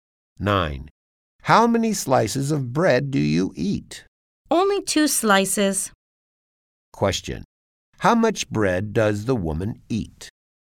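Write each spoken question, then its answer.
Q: How much bread does the woman eat?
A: 2 slices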